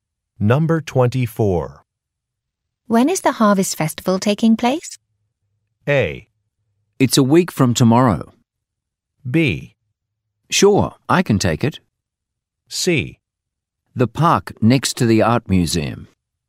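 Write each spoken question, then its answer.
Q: When is the Harvest Festival taking place?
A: A: It's a week from tomorrow.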